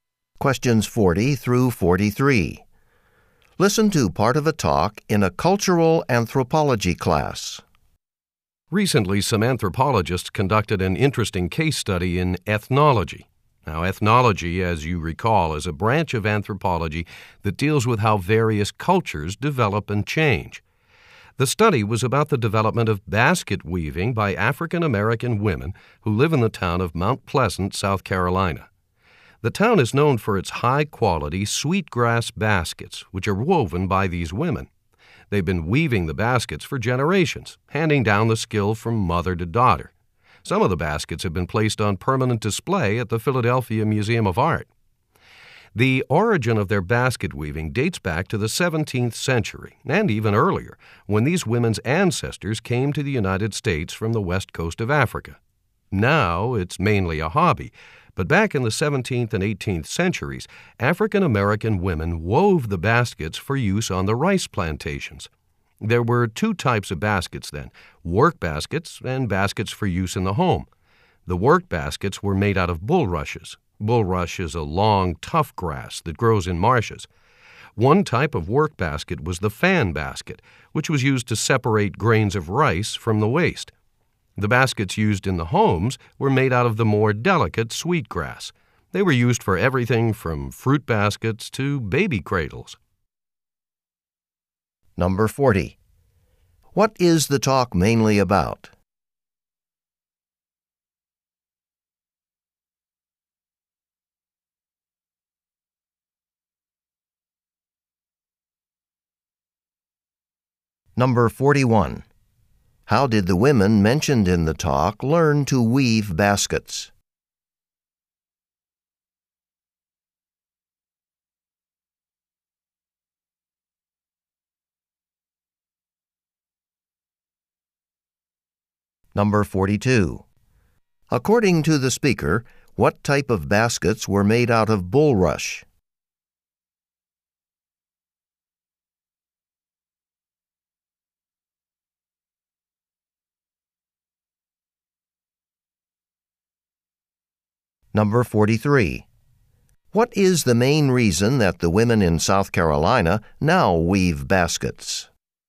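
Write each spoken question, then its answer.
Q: What is the talk mainly about?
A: The basket weaving of African-American women in Mount Pleasant, South Carolina.

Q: How did the women mentioned in the talk learn to weave baskets?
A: Mothers taught their daughters.

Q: According to the speaker, what type of baskets were made out of bulrush?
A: Work baskets, such as fan baskets.

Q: What is the main reason that the women in South Carolina now weave baskets?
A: As a hobby.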